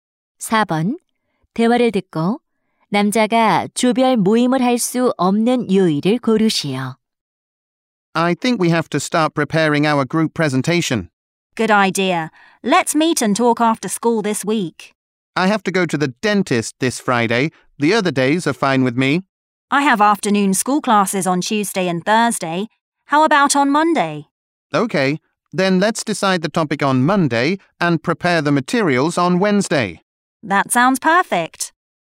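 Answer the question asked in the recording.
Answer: 금요일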